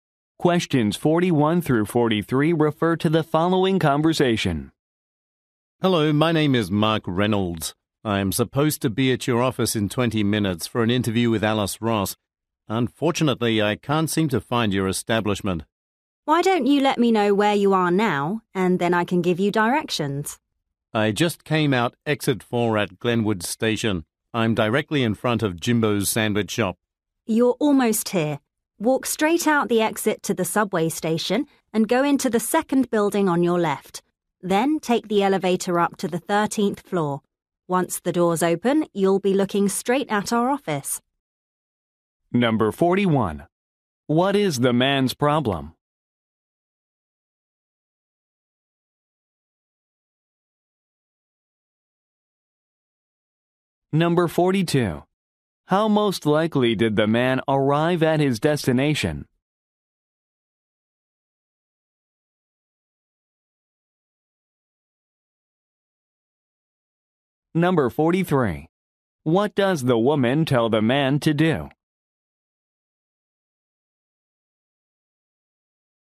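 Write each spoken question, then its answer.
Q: What is the man's problem?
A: He can't find the office

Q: How most likely did the man arrive at his destination?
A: By subway

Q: What does the woman tell the man to do?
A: Go into the second building on the left and take the elevator to the 13th floor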